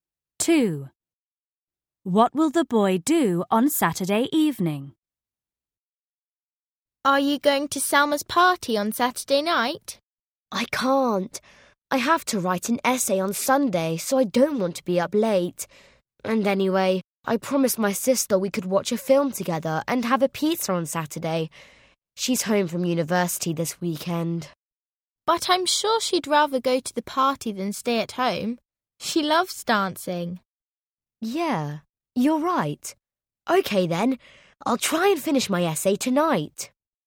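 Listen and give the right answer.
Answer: Go to Selma's party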